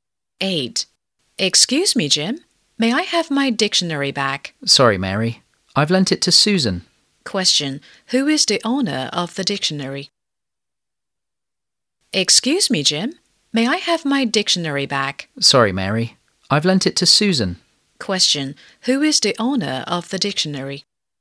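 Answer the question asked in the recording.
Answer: Mary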